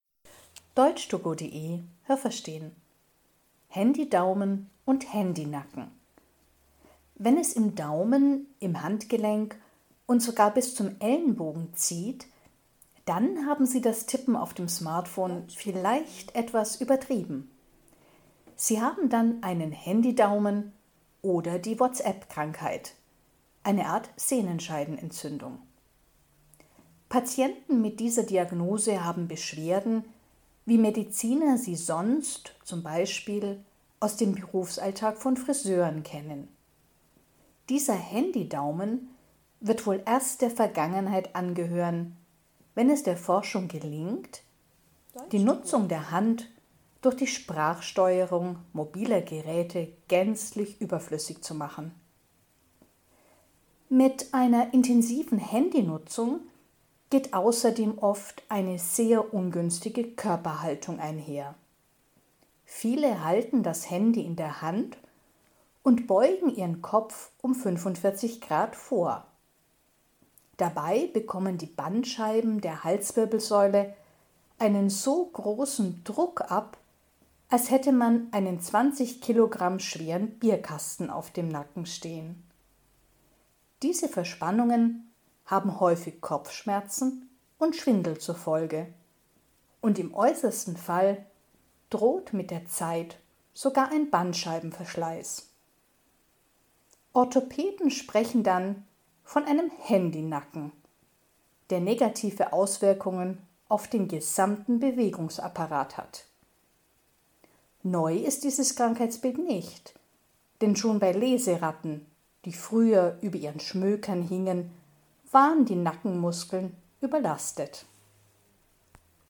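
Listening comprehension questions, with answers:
Haben Sie das gehört? Stimmt diese Aussage?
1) Wenn man zu viele SMS schreibt, bekommt man eine Sehnenzerrung im Handgelenk.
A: falsch

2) Besonders Friseure haben oft eine Sehnenscheidenentzündung, weil sie anscheinend besonders oft das Smartphone benutzen.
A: falsch

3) Die Sprachsteuerung ist überflüssig, weil man bei mobilen Geräten immer einen Handy-Daumen bekommt.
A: falsch

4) Wenn Menschen intensiv das Handy benutzen, neigen sie ihren Kopf oft in einem ungünstigen Winkel.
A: richtig

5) Die Bandscheiben müssen bei diesem ungünstigen Winkel ein Gewicht von circa 20 Kilo aushalten.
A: richtig

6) Der Handy-Nacken beeinträchtigt nur den oberen Teil des Körpers.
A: falsch

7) Früher konnte man auch beim Lesen von Büchern einen Handy-Nacken bekommen.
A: richtig

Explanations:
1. Man bekommt eine Sehnenscheidenentzündung.
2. Eine Sehnenscheidenentzündung ist typisch bei Friseuren, aber nicht wegen des Smartphones, sondern weil sie in ihrem Berufsalltag ihre Handgelenke häufig überstrapazieren.
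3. Die Sprachsteuerung ersetzt das Tippen mit der Hand, und dann gibt es keine Handy-Daumen mehr.
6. Er hat Einfluss auf den ganzen Bewegungsapparat.

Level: C (schwer)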